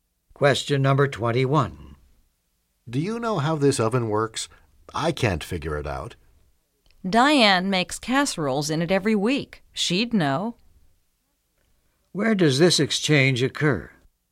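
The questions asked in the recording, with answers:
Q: Where does this exchange occur?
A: In a kitchen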